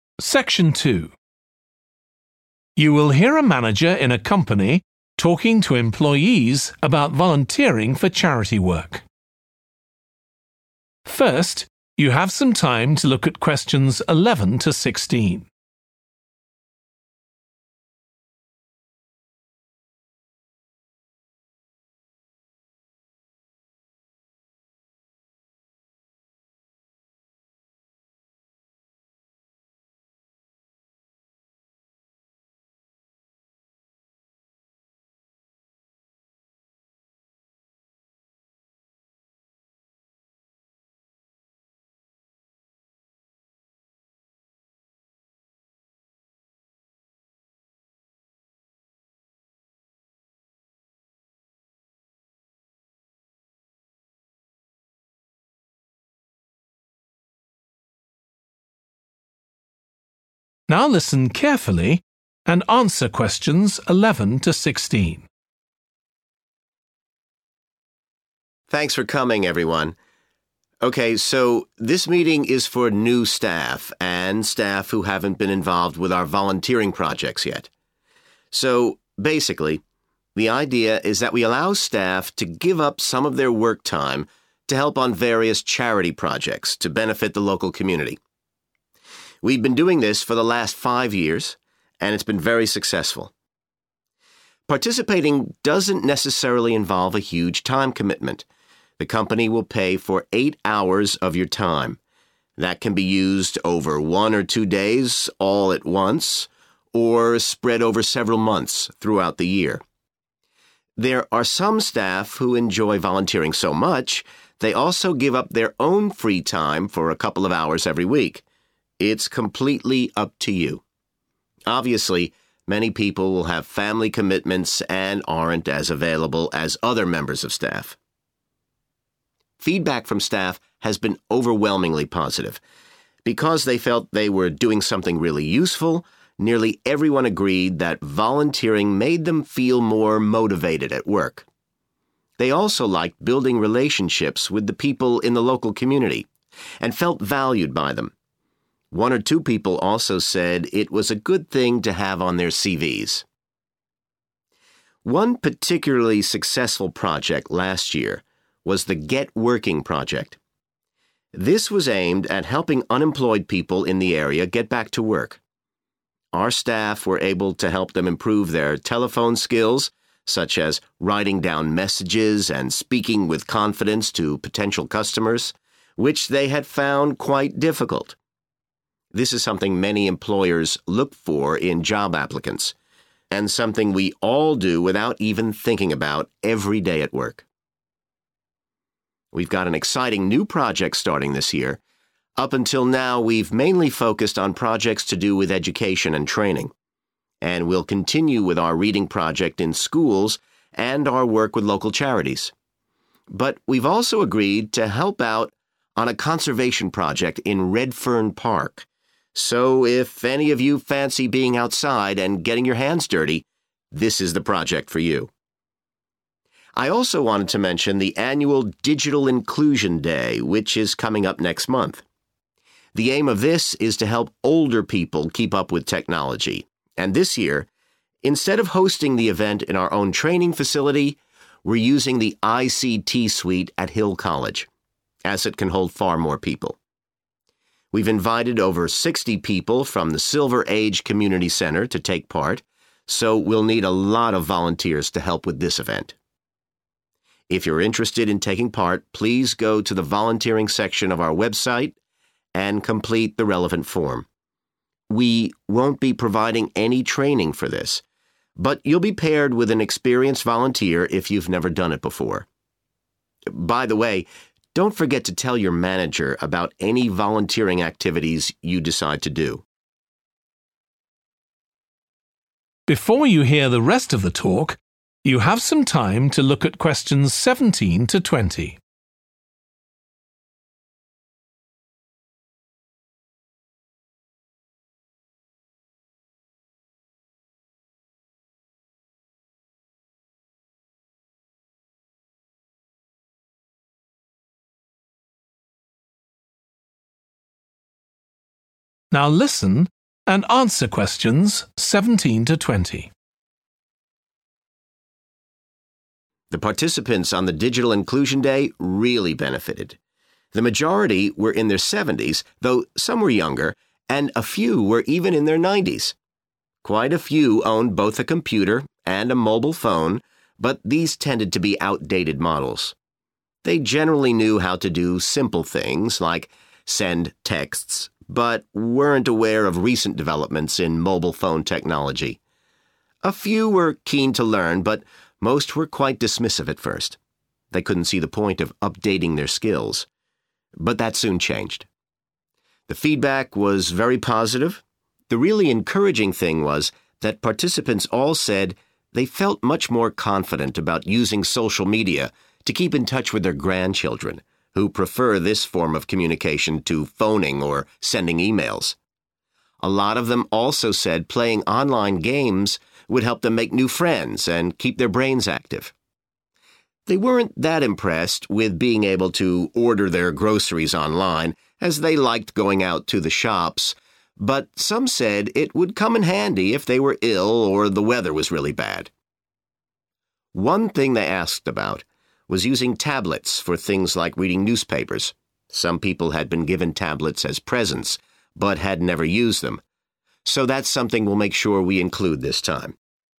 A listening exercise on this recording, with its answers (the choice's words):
Choose the correct letter, A, B or C.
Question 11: How much time for volunteering does the company allow per employee?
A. two hours per week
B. one day per month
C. 8 hours per year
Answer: 8 hours per year

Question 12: In feedback almost all employees said that volunteering improved their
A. chances of promotion.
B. job satisfaction.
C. relationships with colleagues.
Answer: job satisfaction.

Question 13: Last year some staff helped unemployed people with their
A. literacy skills.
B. job applications.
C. communication skills.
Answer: communication skills.

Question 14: This year the company will start a new volunteering project with a local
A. school.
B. park.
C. charity.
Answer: park.

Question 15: Where will the Digital Inclusion Day be held?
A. at the company's training facility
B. at a college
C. in a community centre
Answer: at a college

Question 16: What should staff do if they want to take part in the Digital Inclusion Day?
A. fill in a form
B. attend a training workshop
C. get permission from their manager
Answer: fill in a form

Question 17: What TWO things are mentioned about the participants on the last Digital Inclusion Day?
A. They were all over 70.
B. They never used their computer.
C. Their phones were mostly old-fashioned.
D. They only used their phones for making calls.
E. They initially showed little interest.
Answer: Their phones were mostly old-fashioned.

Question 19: What TWO activities on the last Digital Inclusion Day did participants describe as useful?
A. learning to use tables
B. communicating with family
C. shopping online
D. playing online games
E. sending emails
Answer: communicating with family

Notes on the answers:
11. The transcript talks about how the company will provide payment for eight hours of an employee's time. This time can be used all at once in a day or spread out over several months. Answer Explanation: The answer means that the company allows 8 hours of volunteering time per employee within a year. Reason For Correctness: The correct answer is 'C' (8 hours per year) because the excerpt clearly states that the company will pay for eight hours of an employee's time, which can be used over one or two days all at once or spread over several months throughout the year.
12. The transcript says that because employees felt their volunteering was valuable, most of them agreed that it made them feel more motivated at work. Answer Explanation: The answer 'B' means that volunteering improved the employees' job satisfaction. Reason For Correctness: The correct answer is 'B' because the excerpt mentions that volunteering made employees feel more motivated at work, indicating an increase in their job satisfaction.
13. The transcript talks about how the staff helped unemployed people with their telephone skills, like writing down messages and speaking confidently. Answer Explanation: The answer indicates that the staff helped unemployed people with improving their communication skills. Reason For Correctness: The correct answer (C) is 'communication skills' because the excerpt specifically mentions that the staff assisted individuals in speaking confidently and writing messages, which are key components of communication.
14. But we're also agreed to help out on a conservation project in Redfern Park. Excerpt/Transcript Explanation: The transcript mentions that the company will help with a project in Redfern Park. Answer Explanation: The answer is 'park', which refers to a location like Redfern Park. Reason For Correctness: The correct answer is 'B - park' because the excerpt specifically mentions the company helping out on a project in a park, which aligns with the answer choice 'park'.
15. this year, instead of hosting the event in our own training facility, we're using the ICT suite at Hill College Excerpt/Transcript Explanation: The transcript says that this year, the event will be held at Hill College, not at the company's training facility. Answer Explanation: The answer says that the Digital Inclusion Day will be held at a college. Reason For Correctness: The correct answer is B because the excerpt says the event will take place at Hill College, which is a college.
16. The transcript says that if you want to help on the Digital Inclusion Day, you need to go to the company's website and fill out a form. Answer Explanation: The answer says to 'fill in a form', which means to write your information in the form that is needed. Reason For Correctness: The correct answer is A because the transcript clearly tells you to complete a form if you want to join the Digital Inclusion Day.
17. a mobile phone, but these tended to be outdated model A few were keen to learn but most were quite dismissive at first – they couldn't see the point of updating their skills. Excerpt/Transcript Explanation: The transcript talks about the participants being mostly older adults who had old-fashioned mobile phones. Initially, they were not very interested in learning new skills. Answer Explanation: The answer states that the participants were dismissive at first, showing little interest in learning. Reason For Correctness: The correct answer is 'C' and 'E' because the participants were mostly dismissive initially and couldn't see the point of updating their skills, which aligns with the statements mentioned in the excerpt.
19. participants all said they felt much more confident about using social media to keep in touch with their grandchildren A lot of them also said playing online games would help them make new friends and keep their brains active. Excerpt/Transcript Explanation: The transcript says that participants felt more confident about using social media to keep in touch with their grandchildren, and they also thought playing online games would help them make new friends and keep their brains active. Answer Explanation: The answer is B (communicating with family) and D (sending emails), which are activities participants found useful on Digital Inclusion Day. Reason For Correctness: The correct answer is B and D because the excerpt shows that participants were confident about using social media to communicate with family (grandchildren), and sending emails is a way to communicate too. The excerpt does not mention the other options (tables, shopping online, playing online games) as useful activities on Digital Inclusion Day.

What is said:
Thanks for coming everyone. OK, so this meeting is for new staff and staff who haven't been involved with our volunteering projects yet. So basically, the idea is that we allow staff to give up some of their work time to help on various charity projects to benefit the local community. We've been doing this for the last five years and it's been very successful.
Participating doesn't necessarily involve a huge time commitment. The company will pay for eight hours of your time. That can be used over one or two days all at once, or spread over several months throughout the year. There are some staff who enjoy volunteering so much they also give up their own free time for a couple of hours every week. It's completely up to you. Obviously, many people will have family commitments and aren't as available as other members of staff.
Feedback from staff has been overwhelmingly positive. Because they felt they were doing something really useful, nearly everyone agreed that volunteering made them feel more motivated at work. They also liked building relationships with the people in the local community and felt valued by them. One or two people also said it was a good thing to have on their CVs.
One particularly successful project last year was the Get Working Project. This was aimed at helping unemployed people in the area get back to work. Our staff were able to help them improve their telephone skills, such as writing down messages and speaking with confidence to potential customers, which they had found quite difficult. This is something many employers look for in job applicants – and something we all do without even thinking about, every day at work.
We've got an exciting new project starting this year. Up until now, we're mainly focused on projects to do with education and training. And we'll continue with out reading project in schools and our work with local charities. But we're also agreed to help out on a conservation project in Redfern Park. So if any of you fancy being outside and getting your hands dirty, this is the project for you.
I also want to mention the annual Digital Inclusion Day, which is coming up next month. The aim of this is to help older people keep up with technology. And this year, instead of hosting the event in our own training facility, we're using the ICT suite at Hill College, as it can hold far more people.
We've invited over 60 people from the Silver Age Community Centre to take part, so we'll need a lot of volunteers to help with this event.
If you're interested in taking part, please go to the volunteering section of our website and complete the relevant form. We won't be providing any training for this but you'll be paired with an experienced volunteer if you've never done it before. By the way, don't forget to tell your manager about any volunteering activities you decide to do.
The participants on the Digital Inclusion Day really benefited. The majority were in their seventies, though some where younger and a few were even in their nineties! Quite a few owned both a computer and a mobile phone, but these tended to be outdated model. They generally knew how to do simple things, like send texts, but weren't aware of recent developments in mobile phone technology. A few were keen to learn but most were quite dismissive at first – they couldn't see the point of updating their skills. But that soon changed.
The feedback was very positive. The really encouraging thing was that participants all said they felt much more confident about using social media to keep in touch with their grandchildren, who prefer this form of communication to phoning or sending emails. A lot of them also said playing online games would help them make new friends and keep their brains active. They weren't that impressed with being able to order their groceries online, as they liked going out to the shops, but some said it would come in handy if they were ill or the weather was really bad. One thing they asked about was using tablets for things like reading newspapers – some people had been given tablets as presents but had never used them, so that's something we'll make sure we include this time ...